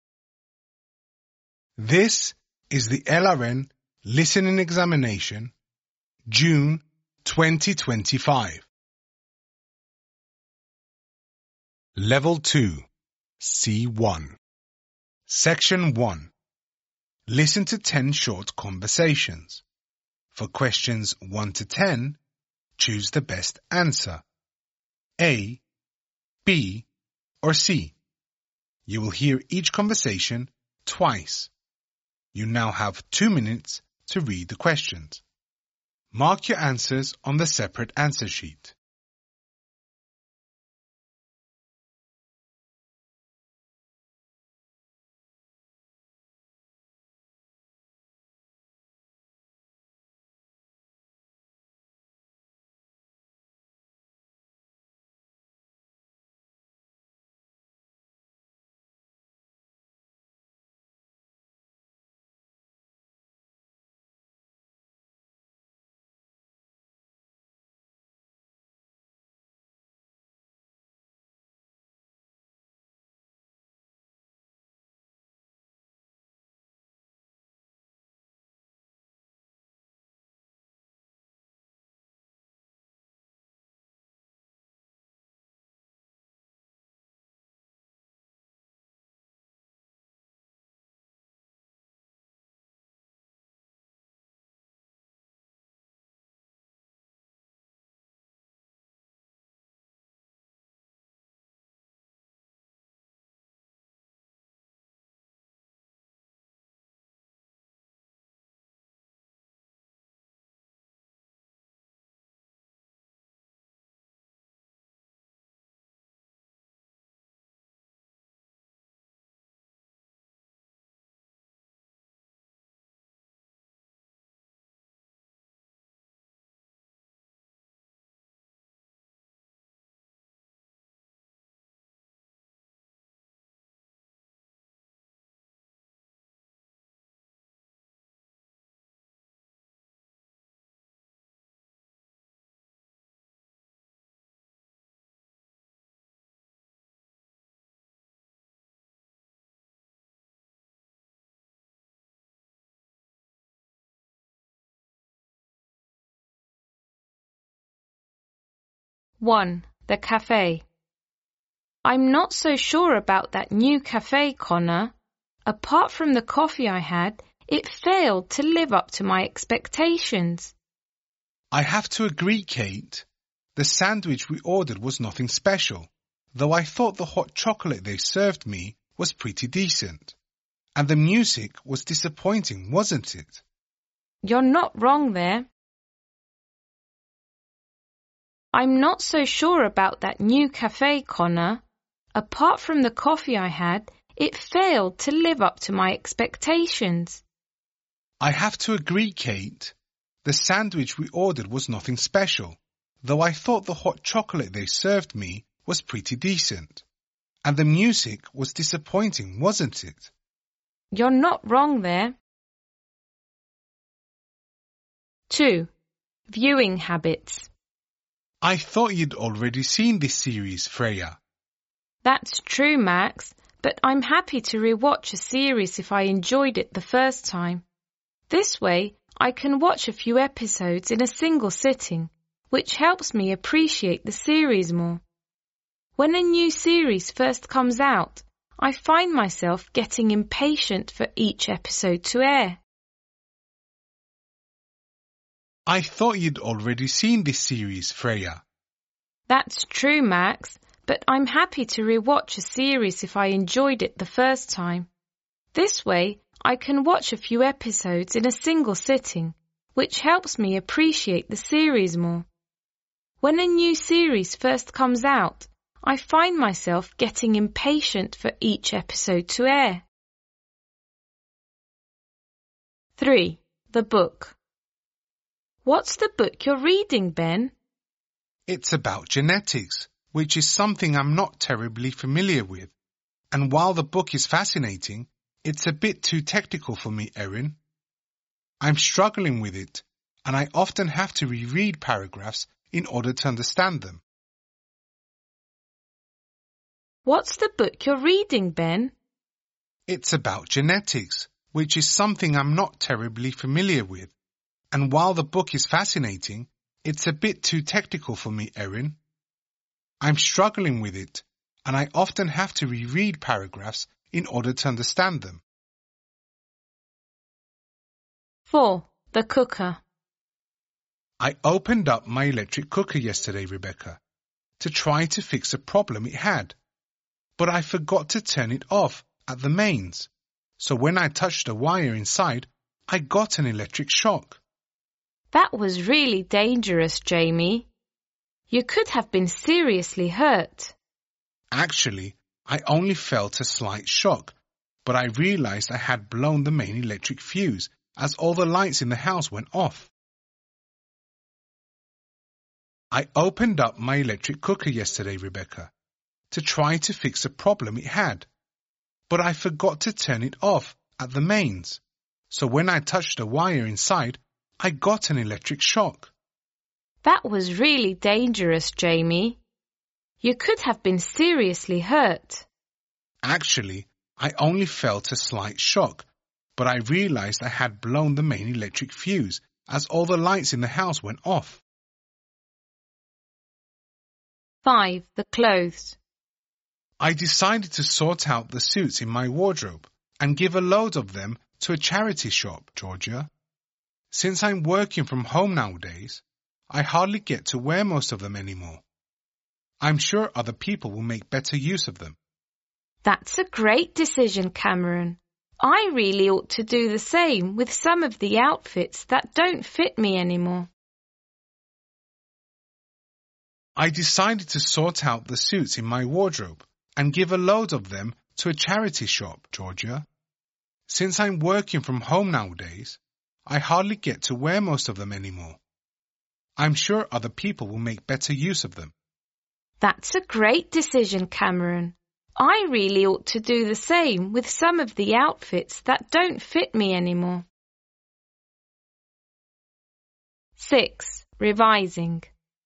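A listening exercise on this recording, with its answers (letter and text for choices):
Listen to 10 short conversations. For questions 1-10, choose the best answer (A, B or C).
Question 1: What do Kate and Conner agree was satisfactory about the café?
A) the beverages it served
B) the food they ordered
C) the music played there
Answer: A) the beverages it served

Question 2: What is FALSE about Freya's viewing habits according to what you hear?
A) She never watches a series more than once.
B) Waiting for a new episode frustrates her.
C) She prefers to watch several episodes in a row.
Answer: A) She never watches a series more than once.

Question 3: How does Ben find the book he is reading?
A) uninteresting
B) hard going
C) easy to follow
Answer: B) hard going

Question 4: What is TRUE about Jamie according to what you hear?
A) He took every precaution before trying to repair the cooker.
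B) He received a nasty electric shock.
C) He accidentally cut the power in his house.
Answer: C) He accidentally cut the power in his house.

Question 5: Cameron decided to give the suits to a charity shop because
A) he has little use for them nowadays.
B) Georgia advised him to do so.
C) he can no longer get into them.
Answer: A) he has little use for them nowadays.

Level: Advanced (C1)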